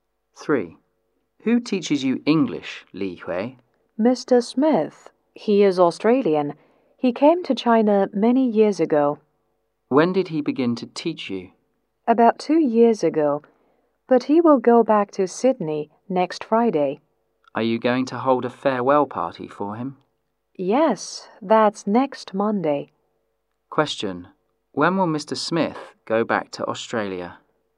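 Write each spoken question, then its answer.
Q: When will Mr. Smith go back to Australia?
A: Next Friday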